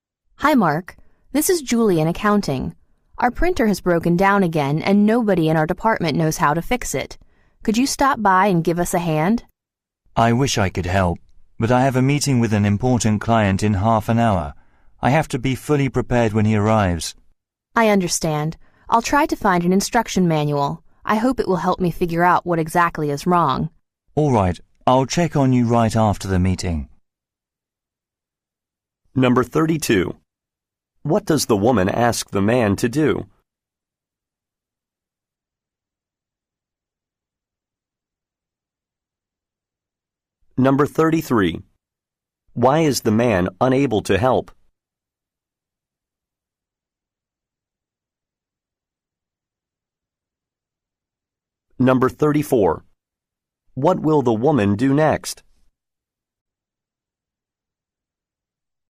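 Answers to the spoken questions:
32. Help fix a broken printer
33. He has a meeting with an important client soon
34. Try to find an instruction manual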